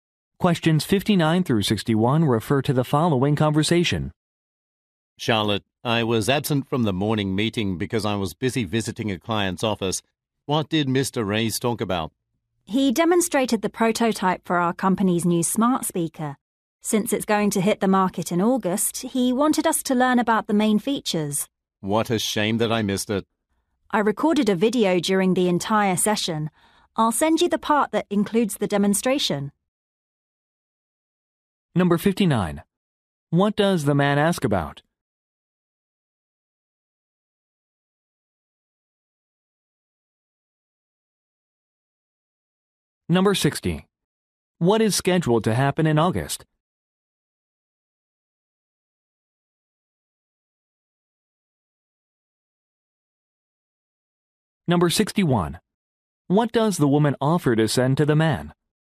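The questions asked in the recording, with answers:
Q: What does the man ask about?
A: What was discussed at the morning meeting

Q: What is scheduled to happen in August?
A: The new smart speaker will go on the market

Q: What does the woman offer to send to the man?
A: The part of the video with the demonstration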